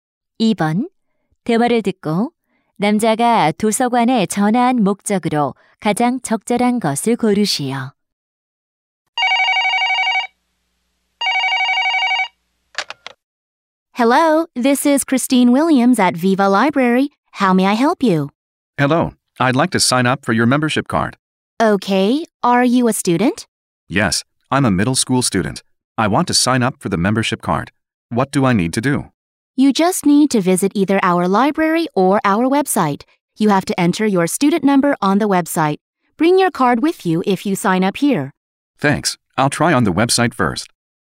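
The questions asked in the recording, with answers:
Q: 대화를 듣고 남자가 도서관에 전화한 목적으로 가장 적절한 것을 고르시오.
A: 회원 카드를 신청하려고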